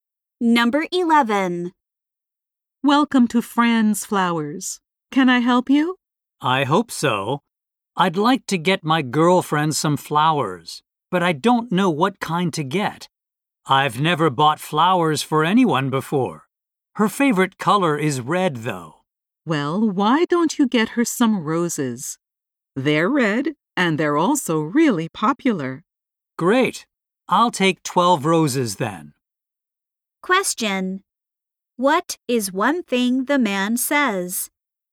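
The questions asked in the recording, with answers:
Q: What is one thing the man says?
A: He has never bought flowers for anyone before.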